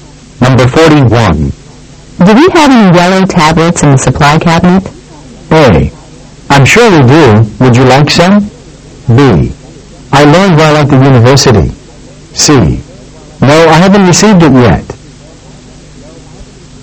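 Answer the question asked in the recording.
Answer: A: I'm sure we do. Would you like some?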